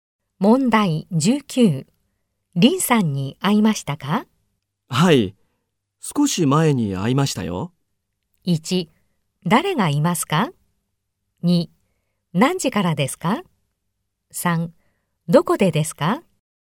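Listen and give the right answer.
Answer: 3: どこでですか?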